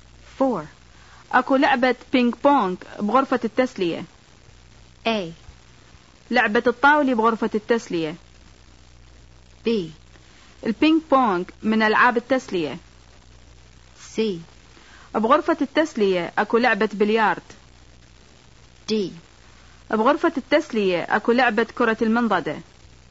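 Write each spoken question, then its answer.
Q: اكو لعبة بينج بونج بغرفة التسلية.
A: D: بغرفة التسلية أكو لعبة كرة المنضدة.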